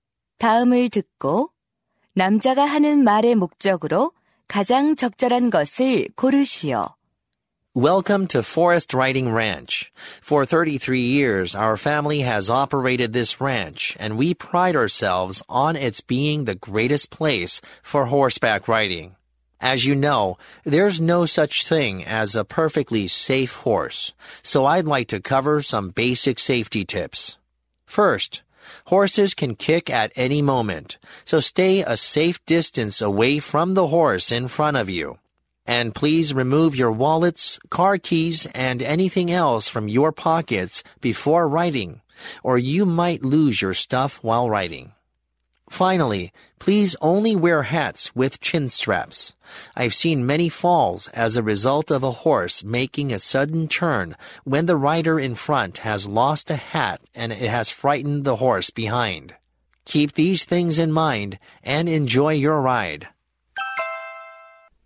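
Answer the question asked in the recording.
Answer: 승마 안전 수칙 안내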